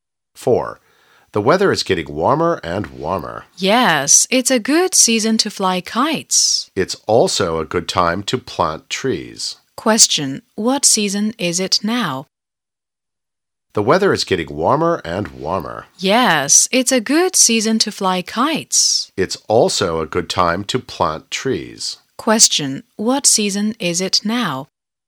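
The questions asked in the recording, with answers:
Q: what season is it now?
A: Spring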